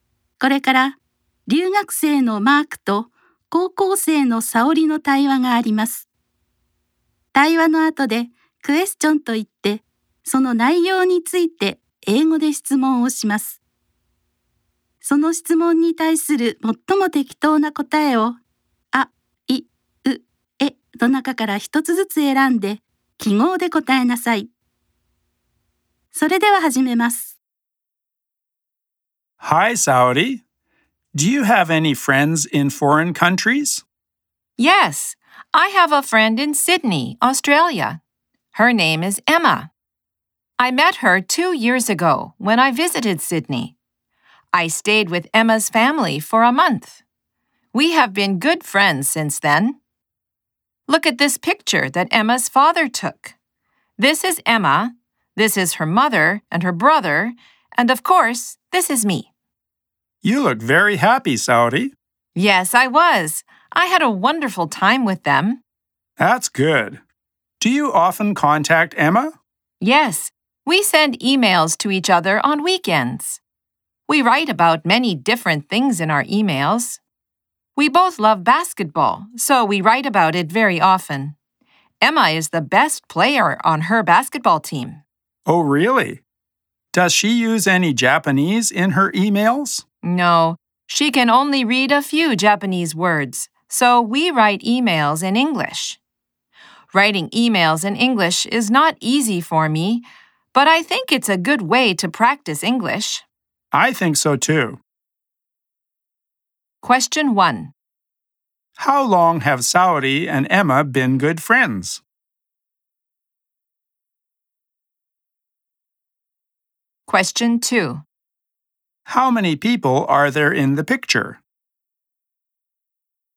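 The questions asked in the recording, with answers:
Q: How long have Saori and Emma been good friends?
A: For two years

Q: How many people are there in the picture?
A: Four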